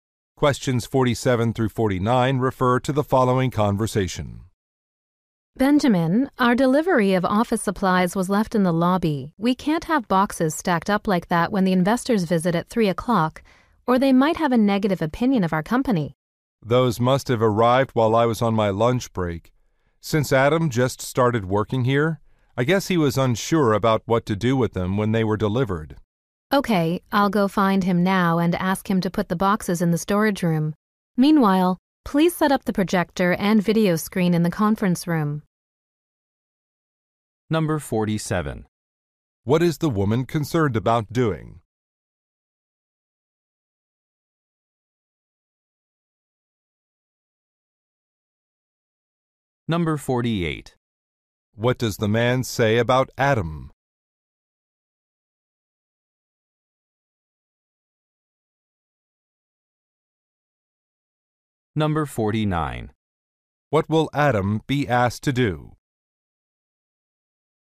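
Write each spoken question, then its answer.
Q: What is the woman concerned about doing?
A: Making a bad impression on visiting investors

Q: What does the man say about Adam?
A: He is a new employee

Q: What will Adam be asked to do?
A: Move the boxes to the storage room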